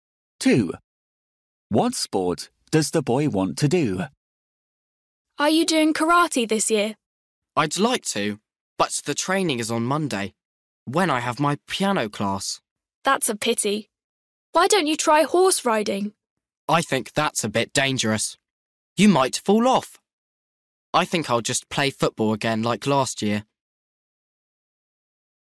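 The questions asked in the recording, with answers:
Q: What sport does the boy want to do?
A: football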